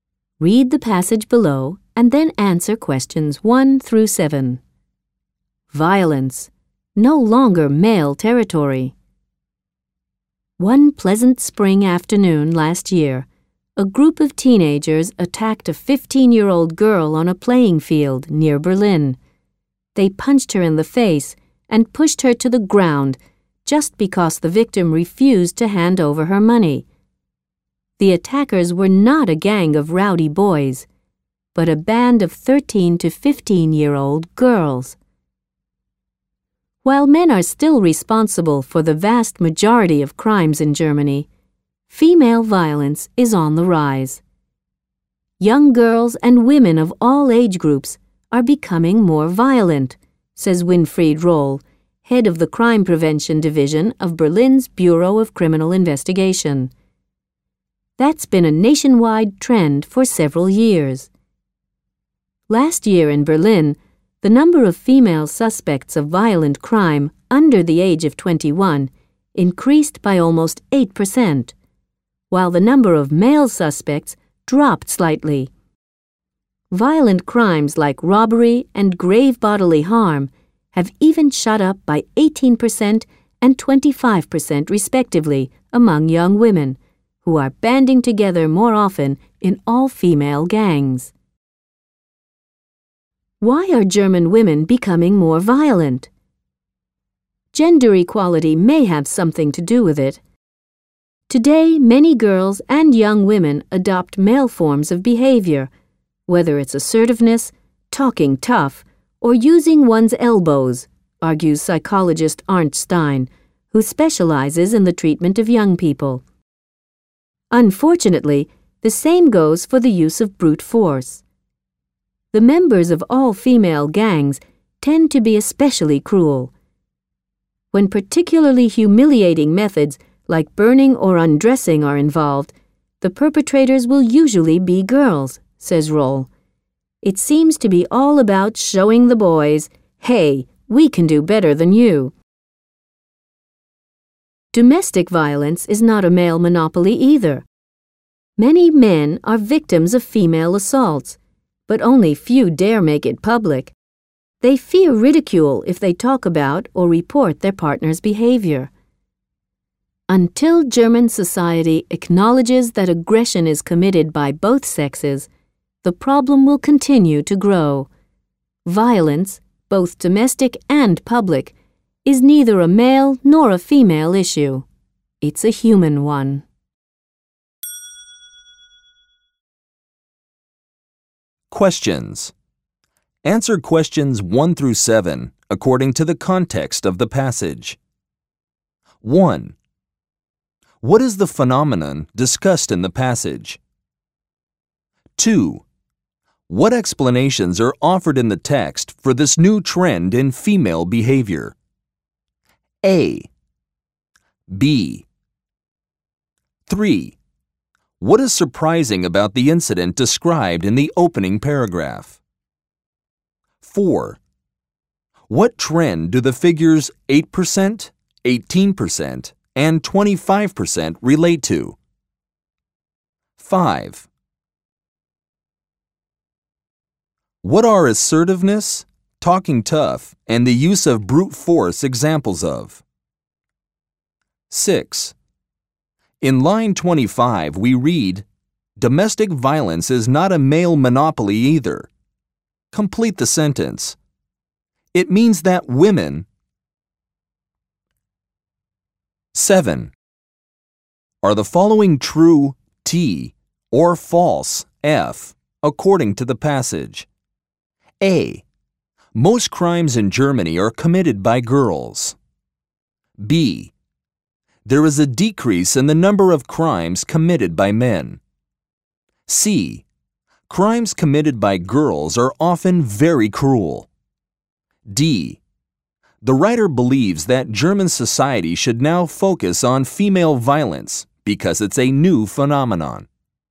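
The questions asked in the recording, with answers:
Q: What is the phenomenon discussed in the passage?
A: Female violence is rising in Germany

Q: What explanations are offered in the text for this new trend in female behavior?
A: Gender equality: girls adopt male behaviour; they want to show boys they can do better

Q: What is surprising about the incident described in the opening paragraph?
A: The attackers were a band of 13- to 15-year-old girls, not boys

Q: What trend do the figures 8%, 18%, and 25% relate to?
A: The rise in violent crime among young women

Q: What are assertiveness, talking tough, and the use of brute force examples of?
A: Male forms of behaviour adopted by girls and young women

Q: In line 25, we read, domestic violence is not a male monopoly either.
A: Women also commit domestic violence (against men)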